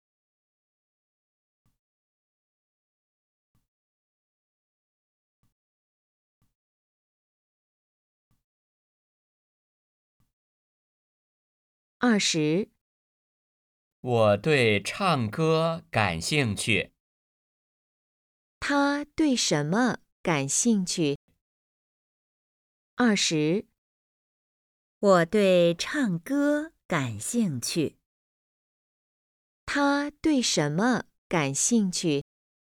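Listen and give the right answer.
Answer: 唱歌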